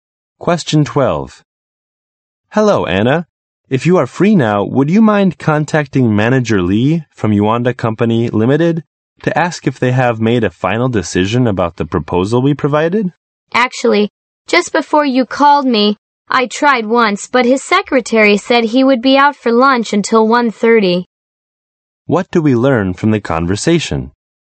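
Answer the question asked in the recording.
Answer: Anna tried to contact Manager Lee, but he is out for lunch until 1:30.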